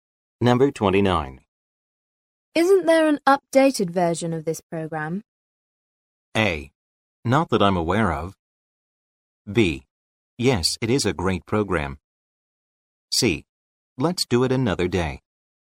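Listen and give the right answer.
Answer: A: Not that I'm aware of.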